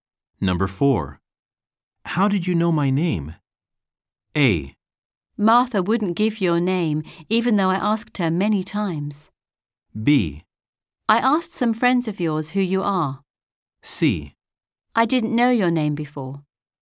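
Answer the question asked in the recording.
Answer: B: I asked some friends of yours who you are.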